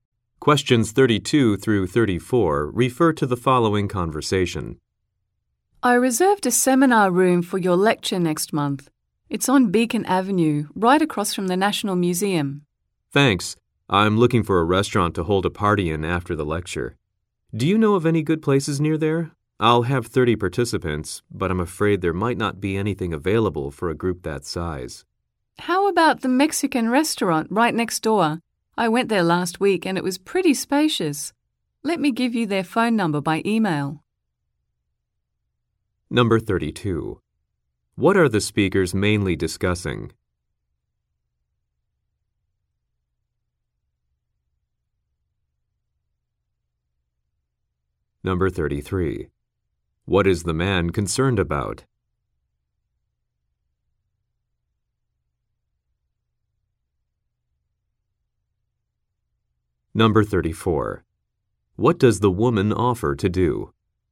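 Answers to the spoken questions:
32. A place to hold a party after the lecture
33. Nowhere may be available for a group of 30
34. Email the restaurant's phone number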